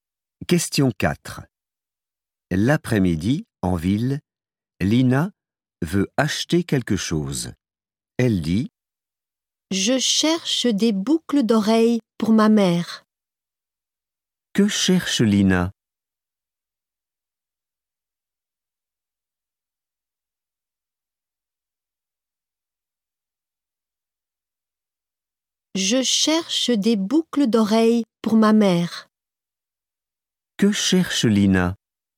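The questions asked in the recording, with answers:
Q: Que cherche Lina?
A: des boucles d'oreilles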